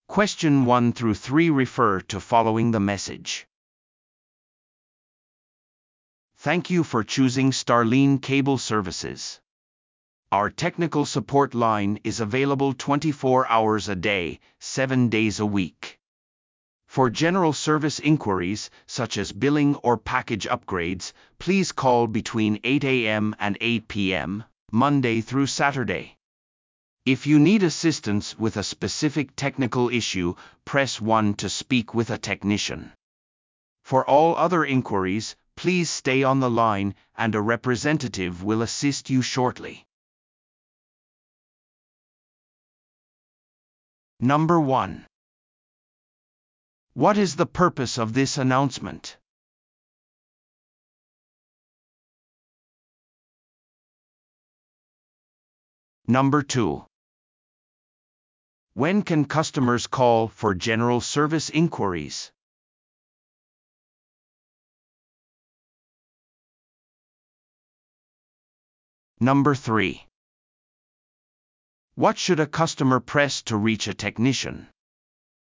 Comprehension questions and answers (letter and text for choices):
Listen to the audio below and answer the questions.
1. What is the purpose of this announcement?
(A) テクニカル サポートの可用性について顧客に通知するため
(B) トラブルシューティング ガイドを提供するため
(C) 新しいサービスについて顧客に通知するため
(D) 価格変更について顧客に通知するため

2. When can customers call for general service inquiries?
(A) 午前8時から午後8時まで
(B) 午前8時から午後10時まで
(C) 24時間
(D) 週末のみ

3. What should a customer press to reach a technician?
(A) 0 を押してください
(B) 1 を押してください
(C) そのまま通話を続けてください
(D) 電話を切って後で電話してください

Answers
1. (A) テクニカル サポートの可用性について顧客に通知するため
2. (A) 午前8時から午後8時まで
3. (B) 1 を押してください

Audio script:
Our technical support line is available 24 hours a day, seven days a week. For general service inquiries, such as billing or package upgrades, please call between 8:00 AM and 8:00 PM, Monday through Saturday. If you need assistance with a specific technical issue, press 1 to speak with a technician. For all other inquiries, please stay on the line, and a representative will assist you shortly.